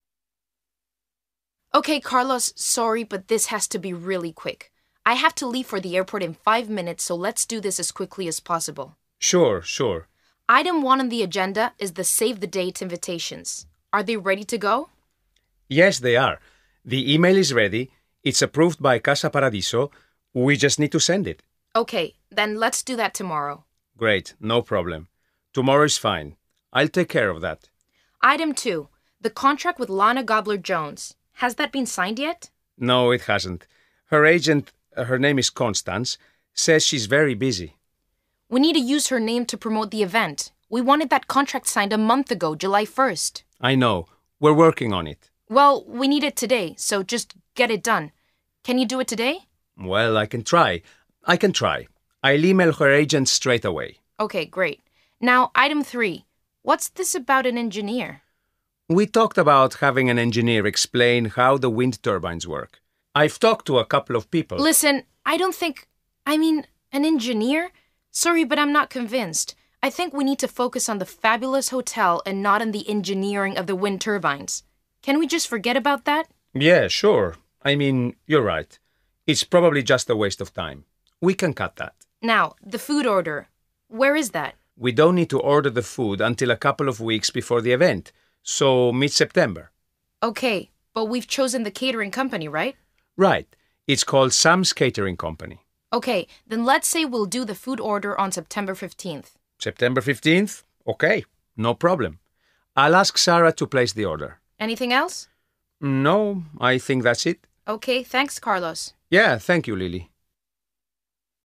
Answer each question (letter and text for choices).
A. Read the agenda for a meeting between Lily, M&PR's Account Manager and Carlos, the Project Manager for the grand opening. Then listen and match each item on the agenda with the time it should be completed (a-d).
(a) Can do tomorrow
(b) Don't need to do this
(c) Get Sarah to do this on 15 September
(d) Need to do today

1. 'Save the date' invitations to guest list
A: (a) Can do tomorrow

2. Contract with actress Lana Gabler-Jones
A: (d) Need to do today

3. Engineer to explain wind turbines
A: (b) Don't need to do this

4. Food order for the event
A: (c) Get Sarah to do this on 15 September

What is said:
L: OK, Carlos, sorry, but this has to be really quick. I have to leave for the airport in five minutes, so let's do this as quickly as possible.
C: Sure, sure.
L: Item one on the agenda is the 'Save the date' invitations. Are they ready to go?
C: Yes, they are. The email is ready, it's approved by Casa Paradiso – we just need to send it.
L: OK, then let's do that tomorrow.
C: Great. No problem. Tomorrow is ne. I'll take care of that.
L: Item two – the contract with Lana Gabler-Jones. Has that been signed yet?
C: No, it hasn't. Her agent – her name is Constance – says she's very busy.
L: We need to use her name to promote the event. We wanted that contract signed a month ago – July first.
C: I know. We're working on it.
L: Well, we need it today, so just get it done. Can you do it today?
C: Well, I can try. I can try. I'll email her agent straightaway.
L: OK, great. Now, item three. What's this about an engineer?
C: We talked about having an engineer explain how the wind turbines work. I've talked to a couple of people ...
L: Listen, I don't think ... I mean, an engineer? Sorry, but I'm not convinced. I think we need to focus on the fabulous hotel, and not on the engineering of the wind turbines. Can we just forget about that?
C: Yeah, sure. I mean, you're right. It's probably just a waste of time. We can cut that.
L: Now, the food order. Where is that?
C: We don't need to order the food until a couple of weeks before the event – so mid-September.
L: OK. But we've chosen the catering company, right?
C: Right. It's called Sam's Catering Company.
L: OK, then let's say we'll do the food order on September fifteenth.
C: September fifteenth? OK. No problem. I'll ask Sarah to place the order.
L: Anything else?
C: No, I think that's it.
L: OK, thanks, Carlos.
C: Yeah, thank you, Lily.